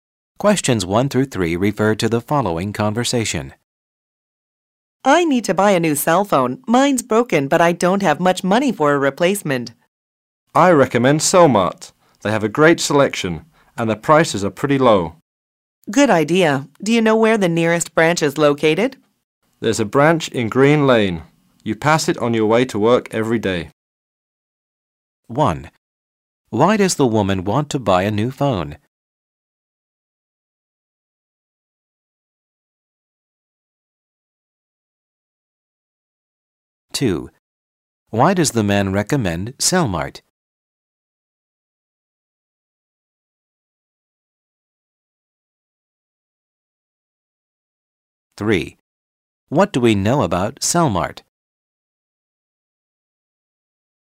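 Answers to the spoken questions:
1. Her phone is broken
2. Great selection and low prices
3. It has a branch on Green Lane, on her way to work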